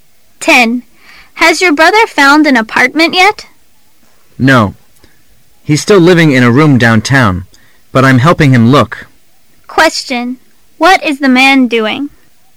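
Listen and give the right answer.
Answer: Helping his brother look for an apartment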